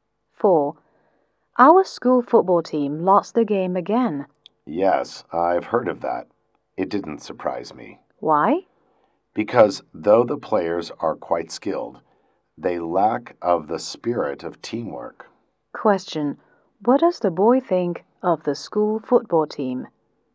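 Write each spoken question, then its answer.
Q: What does the boy think of the school football team?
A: The players are skilled but lack teamwork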